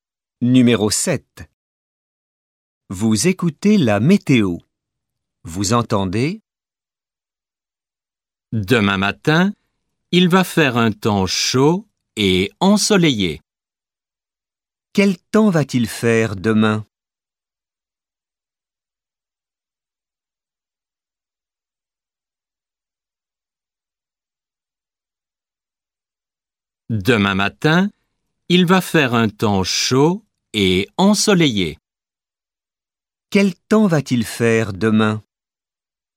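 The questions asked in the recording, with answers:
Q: Quel temps va-t-il faire demain?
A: Chaud et ensoleillé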